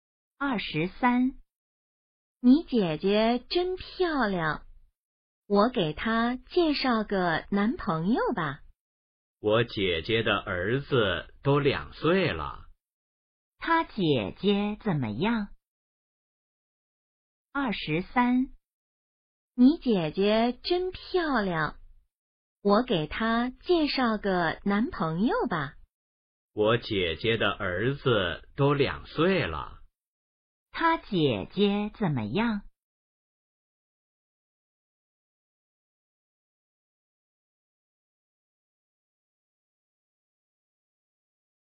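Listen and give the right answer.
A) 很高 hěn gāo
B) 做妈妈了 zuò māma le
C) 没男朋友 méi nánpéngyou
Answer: B) 做妈妈了 zuò māma le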